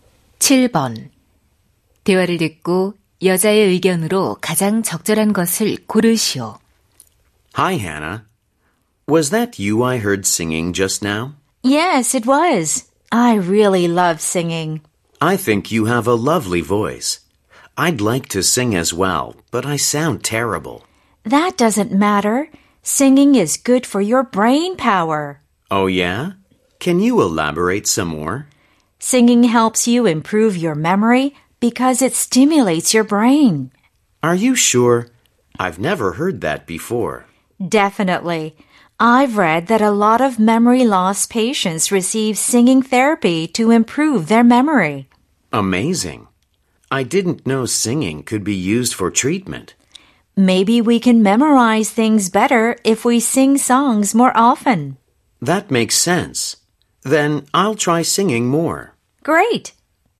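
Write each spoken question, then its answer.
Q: 대화를 듣고 여자의 의견으로 가장 적절한 것을 고르시오.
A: 노래를 부르면 기억력 향상에 도움이 된다.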